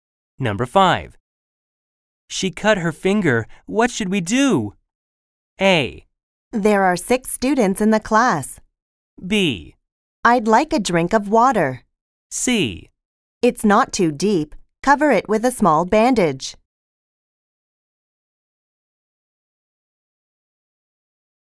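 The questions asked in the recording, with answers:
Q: She cut her finger. What should we do?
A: C: It's not too deep. Cover it with a small bandage.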